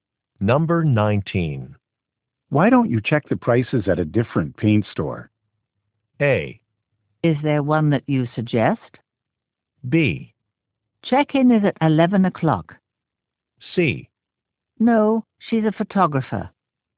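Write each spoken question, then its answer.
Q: Why don't you check the prices at a different paint store?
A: A: Is there one that you suggest?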